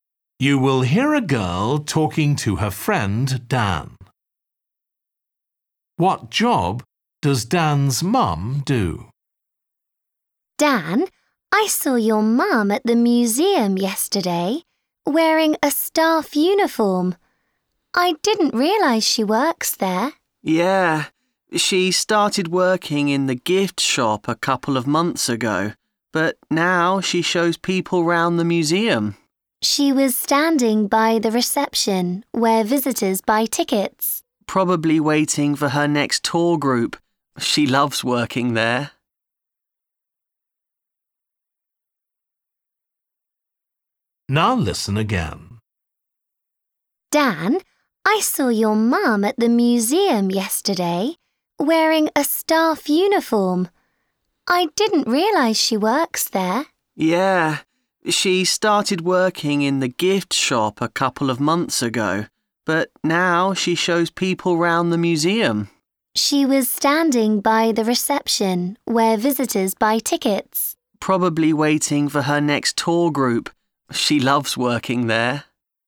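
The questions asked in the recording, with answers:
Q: What job does Dan's mum do?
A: She is a museum tour guide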